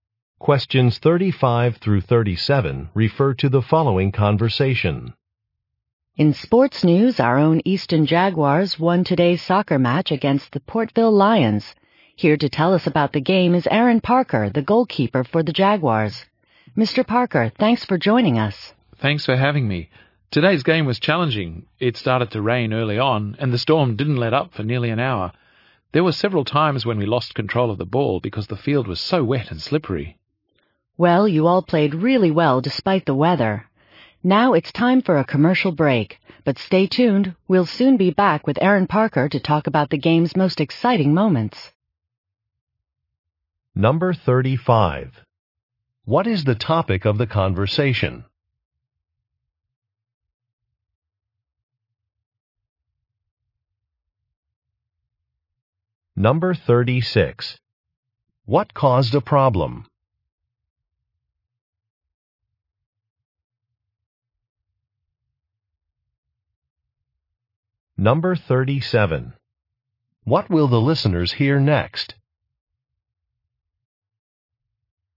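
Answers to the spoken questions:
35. A soccer match
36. Rain / wet weather
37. A commercial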